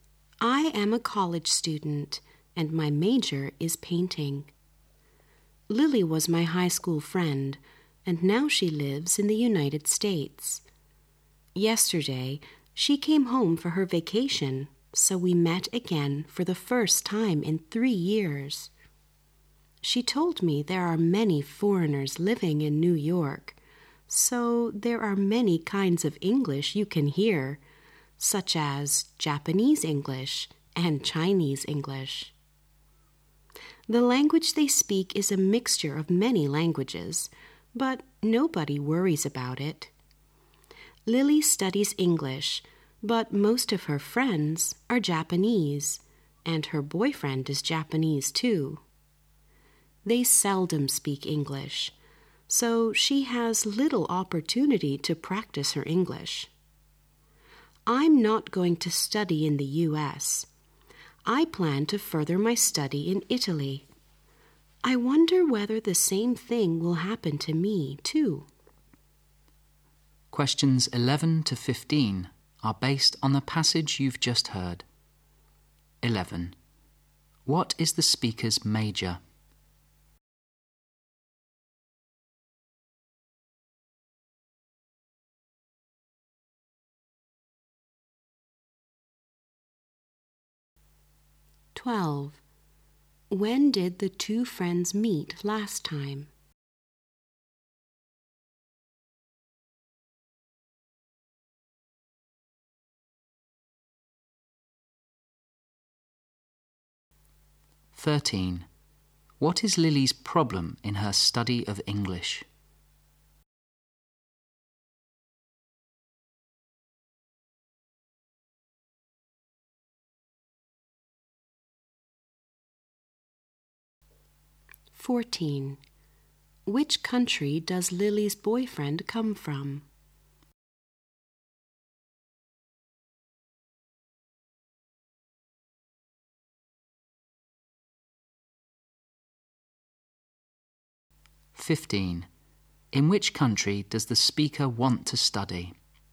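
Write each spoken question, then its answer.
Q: What is the speaker's major?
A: Painting.

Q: When did the two friends meet last time?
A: 3 years ago.

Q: What is Lily's problem in her study of English?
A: Little opportunity to practice.

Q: Which country does Lily's boyfriend come from?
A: Japan.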